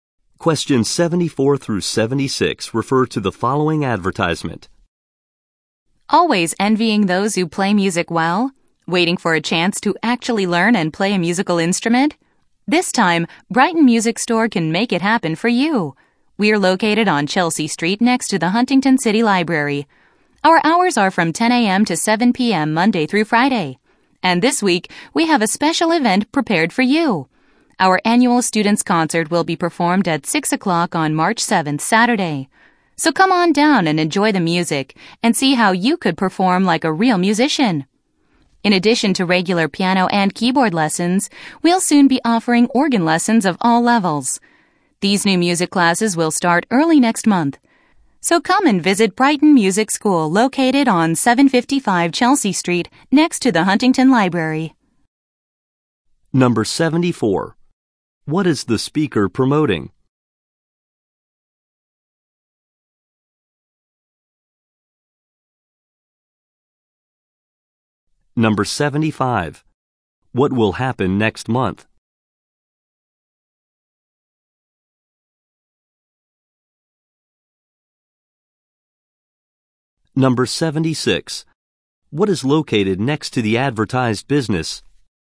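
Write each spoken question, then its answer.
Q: What is the speaker promoting?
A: A music store/school offering lessons

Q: What will happen next month?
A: New organ lessons will start

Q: What is located next to the advertised business?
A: The Huntington City Library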